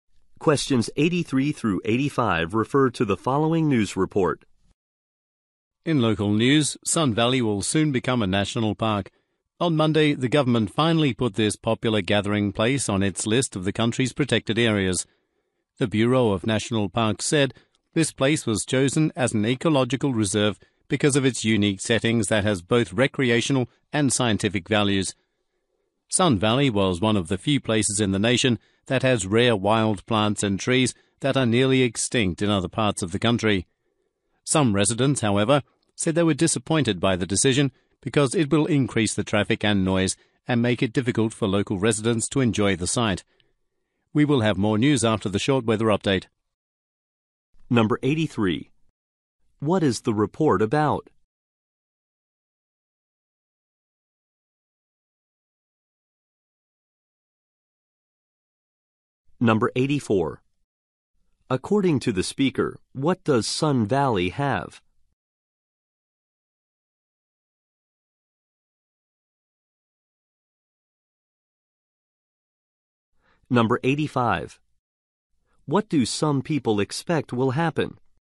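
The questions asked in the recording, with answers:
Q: What is the report about?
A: Sun Valley becoming a national park

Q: According to the speaker, what does Sun Valley have?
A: Rare wild plants and trees

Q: What do some people expect will happen?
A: Traffic and noise will increase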